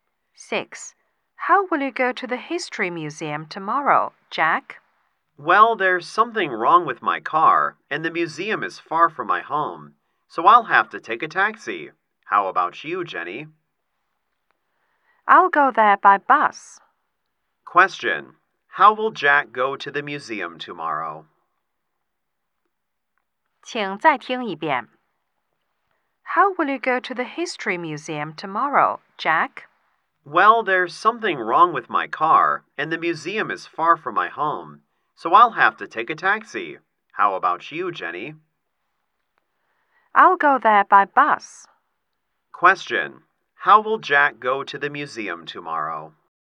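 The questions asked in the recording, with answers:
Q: How will Jack go to the museum tomorrow?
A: By taxi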